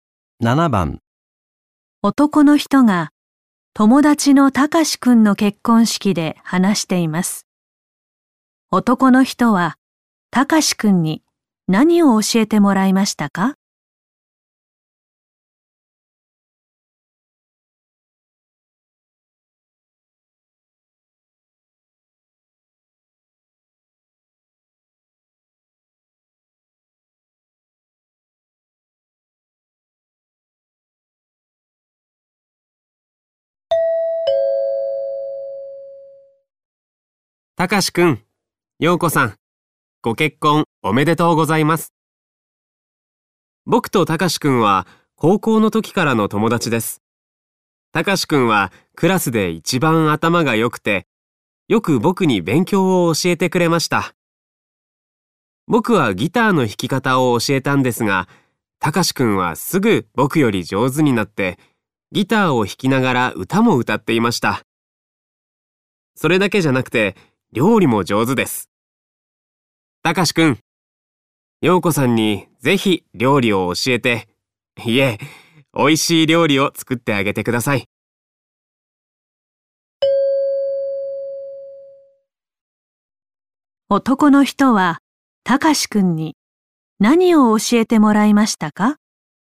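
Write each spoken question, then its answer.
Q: 男の人はたかしくんに何を教えてもらいましたか?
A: 勉強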